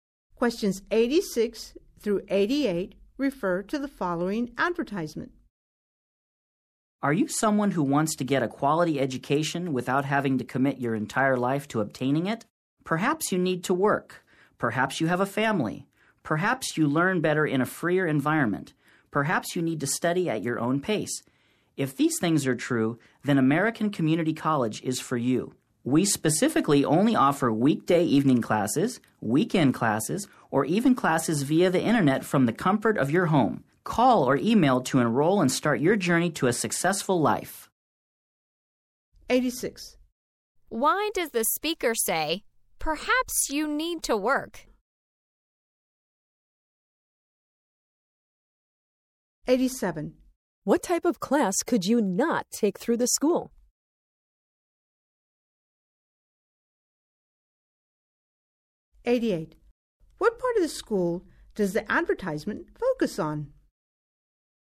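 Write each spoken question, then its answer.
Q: What type of class could you not take through the school?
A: Weekday daytime classes

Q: What part of the school does the advertisement focus on?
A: Its flexible class schedule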